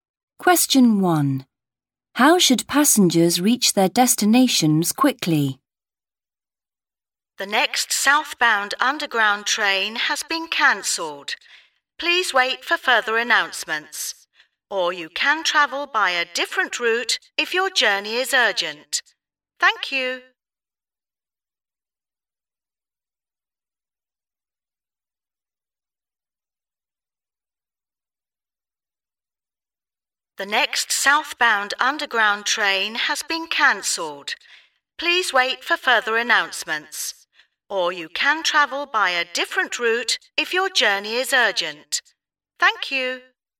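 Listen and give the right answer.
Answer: Travel by a different route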